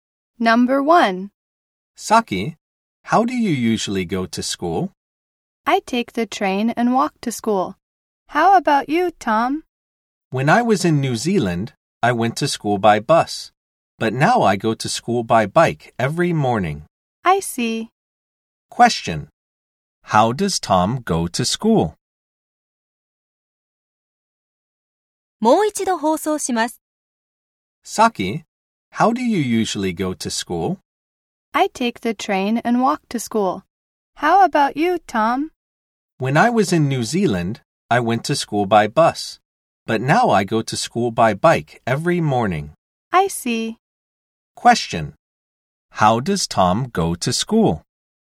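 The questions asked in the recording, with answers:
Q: How does Tom go to school?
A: By bike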